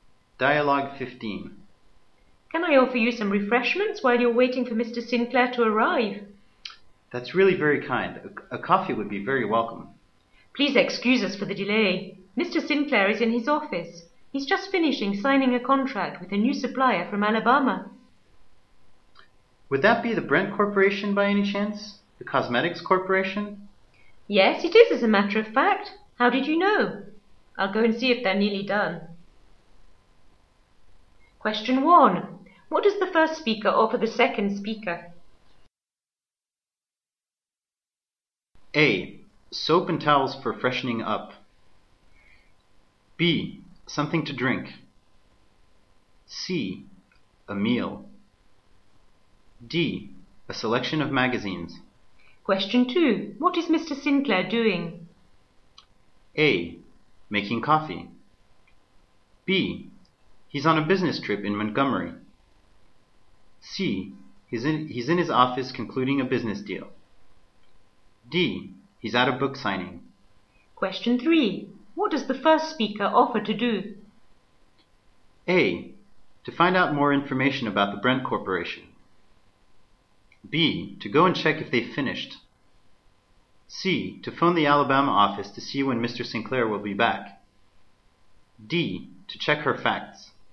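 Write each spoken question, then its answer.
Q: What does the first speaker offer the second speaker?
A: B: Something to drink.

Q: What is Mr. Sinclair doing?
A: C: He's in his office concluding a business deal.

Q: What does the first speaker offer to do?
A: B: To go and check if they've finished.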